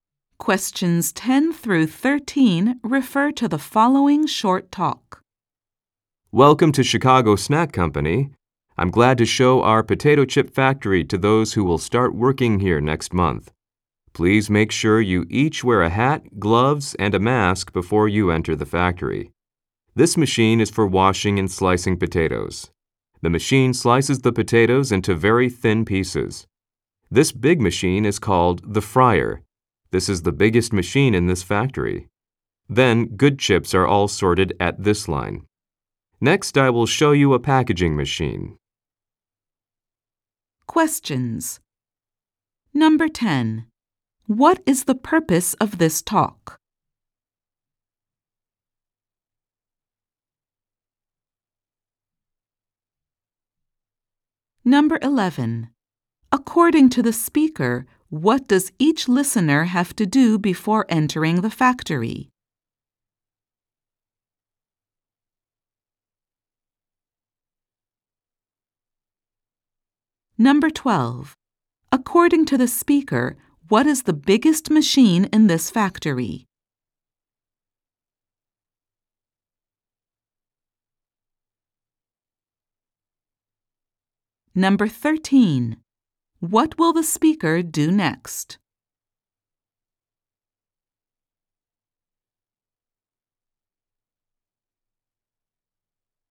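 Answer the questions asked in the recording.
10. To give new employees a tour of the potato chip factory
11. Wear a hat, gloves, and a mask
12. The fryer
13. Show them a packaging machine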